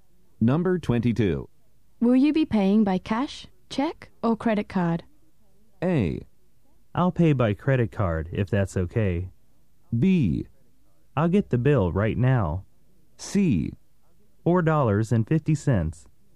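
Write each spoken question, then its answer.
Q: Will you be paying by cash, check, or credit card?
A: A: I'll pay by credit card, if that's okay.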